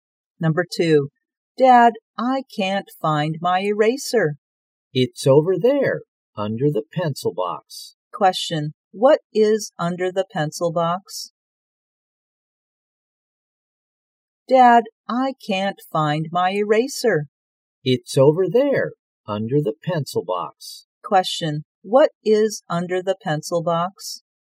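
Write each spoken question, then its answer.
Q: Question, what is under the pencil box?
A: The eraser.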